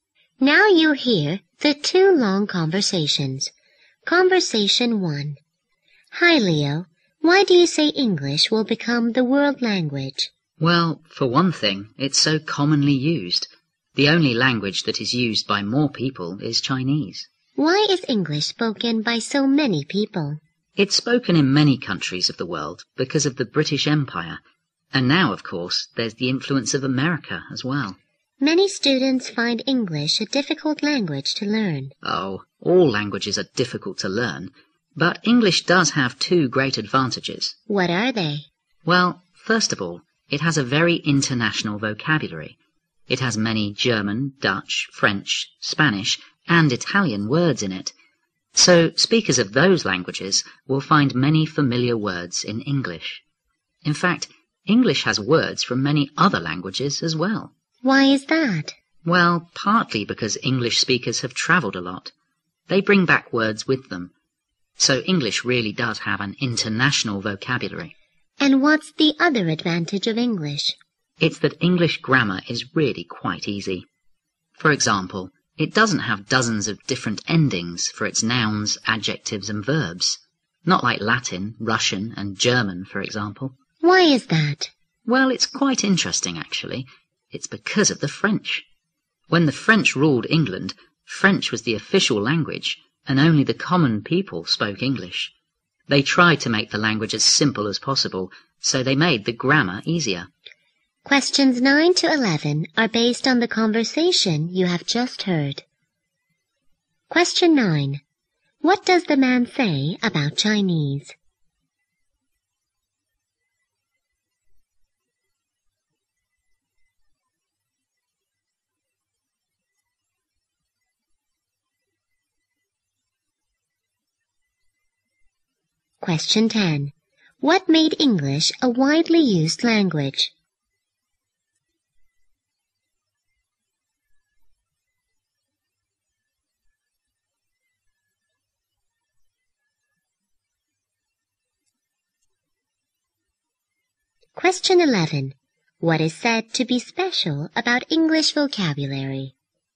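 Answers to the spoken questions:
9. It is used by more people than any other language.
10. The British Empire and the influence of America.
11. It is very international.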